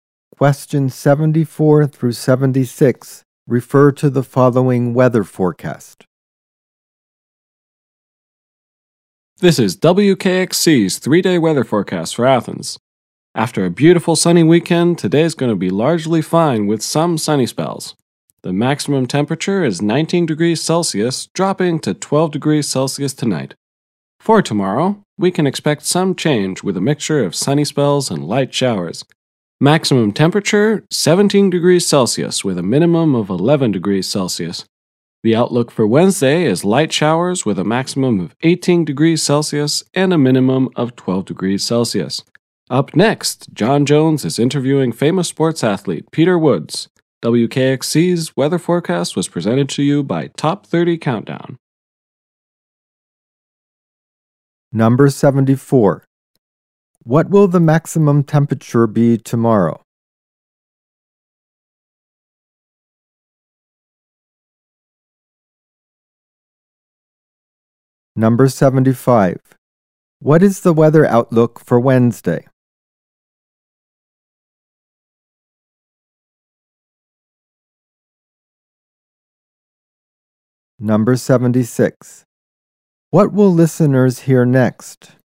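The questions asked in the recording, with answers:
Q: What will the maximum temperature be tomorrow?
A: 17 degrees Celsius

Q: What is the weather outlook for Wednesday?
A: Light showers

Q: What will listeners hear next?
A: An interview with athlete Peter Woods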